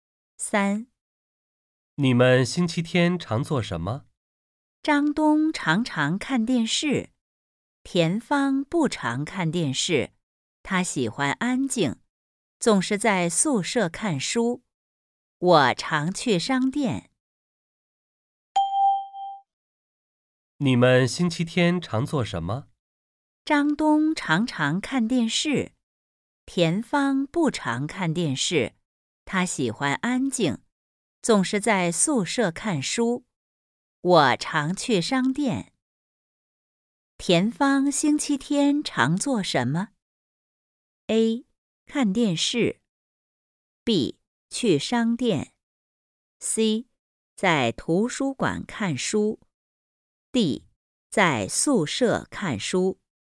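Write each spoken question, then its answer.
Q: 田芳星期天常做什么?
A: D: 在宿舍看书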